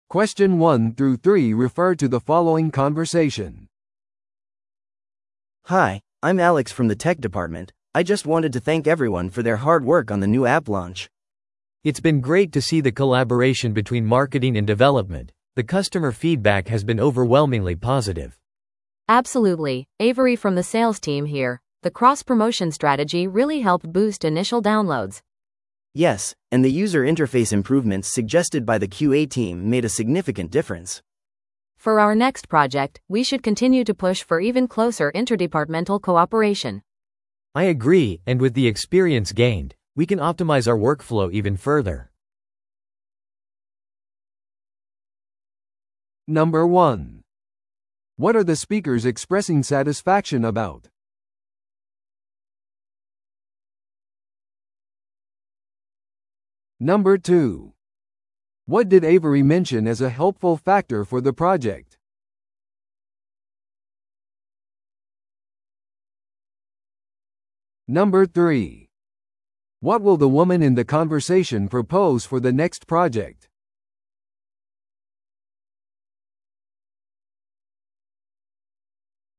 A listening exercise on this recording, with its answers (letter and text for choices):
Listen to the audio below and answer the questions.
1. What are the speakers expressing satisfaction about?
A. 仕事のボーナスを受け取ること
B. 共同プロジェクトの協力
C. 新しいチームメンバーの採用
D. 新しい広告キャンペーンの開始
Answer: B. 共同プロジェクトの協力

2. What did Avery mention as a helpful factor for the project?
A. プロジェクトの締め切り延長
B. 新しいソフトウェアツールの導入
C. 経営陣からのサポート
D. クロスプロモーション戦略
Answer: D. クロスプロモーション戦略

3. What will the woman in the conversation propose for the next project?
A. 会議の回数を減らす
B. 部門間の協力を続ける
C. プロジェクトリーダーを変える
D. マーケティングの予算を減らす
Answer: B. 部門間の協力を続ける

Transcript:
A: Hi, I'm Alex from the tech department. I just wanted to thank everyone for their hard work on the new app launch.
B: It's been great to see the collaboration between marketing and development. The customer feedback has been overwhelmingly positive.
C: Absolutely, Avery from the sales team here. The cross-promotion strategy really helped boost initial downloads.
A: Yes, and the user interface improvements suggested by the QA team made a significant difference.
C: For our next project, we should continue to push for even closer interdepartmental cooperation.
B: I agree, and with the experience gained, we can optimize our workflow even further.